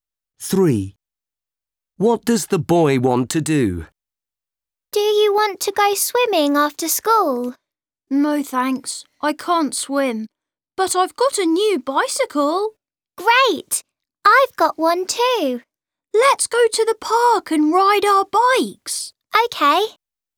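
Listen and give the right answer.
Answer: Ride bikes in the park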